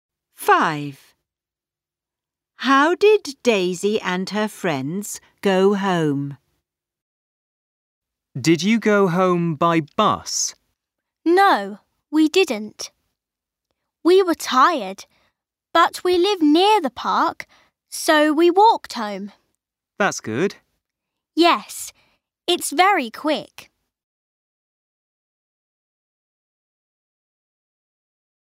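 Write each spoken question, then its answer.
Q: How did Daisy and her friends go home?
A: They walked home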